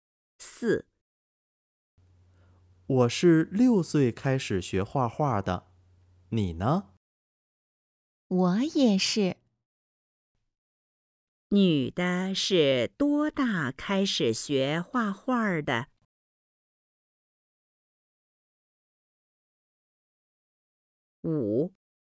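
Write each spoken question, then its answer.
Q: 女的是多大开始学画画的?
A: 6岁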